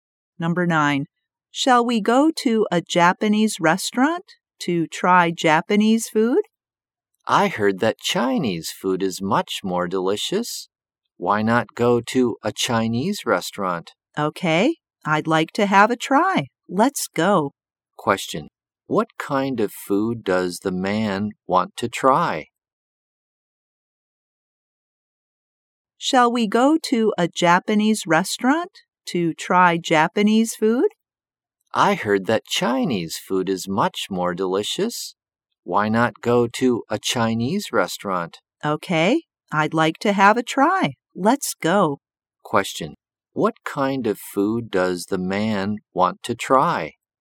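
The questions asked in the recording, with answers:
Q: What kind of food does the man want to try?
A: Chinese food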